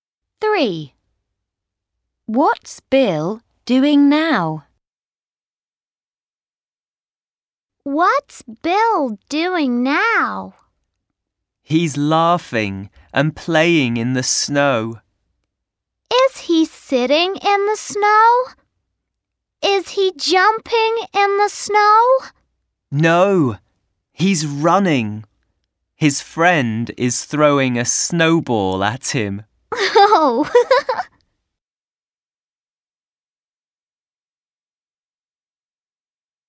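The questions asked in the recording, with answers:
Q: What's Bill doing now?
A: He's running in the snow.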